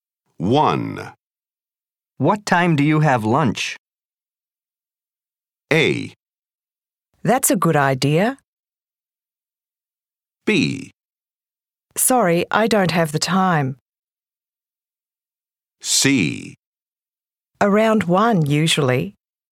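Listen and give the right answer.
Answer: C: Around 1, usually.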